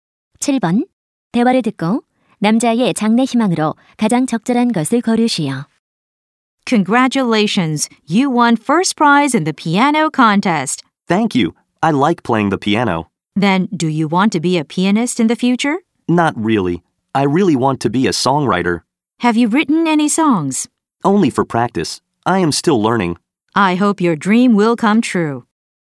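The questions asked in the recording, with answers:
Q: 대화를 듣고 남자의 장래 희망으로 가장 적절한 것을 고르시오.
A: 작곡가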